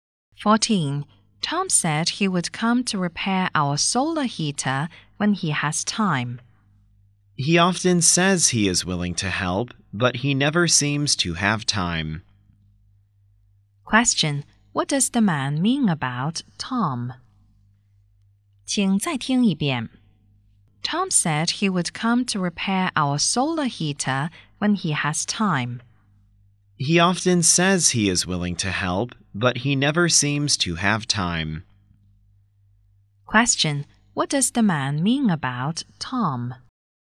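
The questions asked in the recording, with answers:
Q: Question: What does the man mean about Tom?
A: Tom says he'll help but never has time, so he probably won't come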